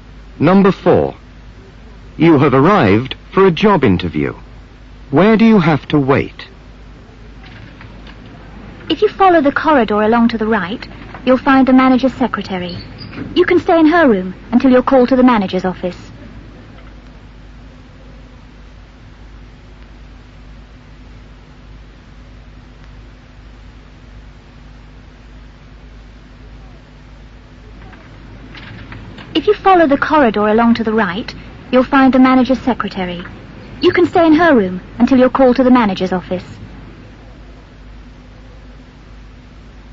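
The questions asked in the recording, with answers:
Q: Where do you have to wait?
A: In the manager's secretary's room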